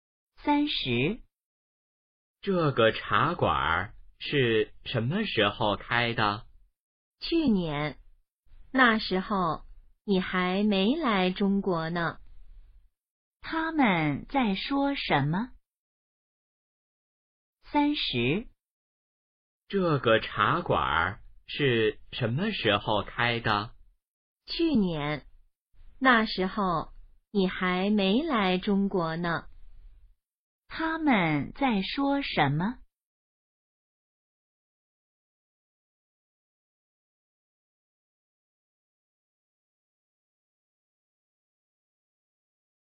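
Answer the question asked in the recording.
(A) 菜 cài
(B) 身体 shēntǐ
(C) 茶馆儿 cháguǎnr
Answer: (C) 茶馆儿 cháguǎnr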